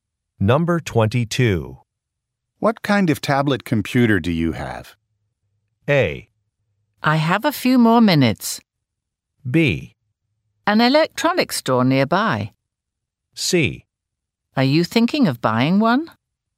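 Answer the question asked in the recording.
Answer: C: Are you thinking of buying one?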